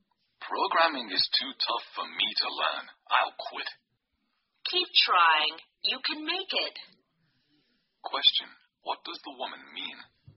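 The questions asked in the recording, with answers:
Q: What does the woman mean?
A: The man should keep trying to learn programming.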